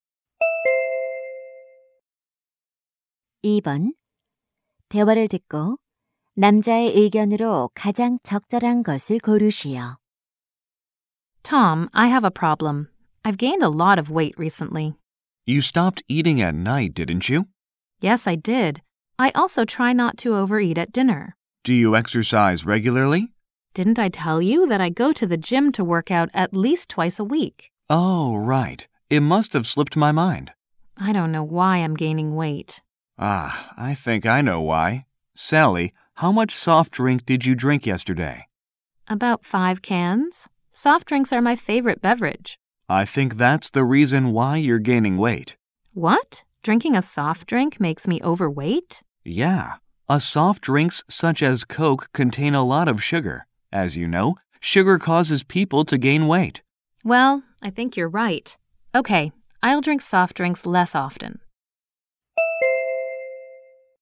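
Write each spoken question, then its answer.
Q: 대화를 듣고 남자의 의견으로 가장 적절한 것을 고르시오.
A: 탄산음료는 설탕이 많아 체중 증가의 원인이 된다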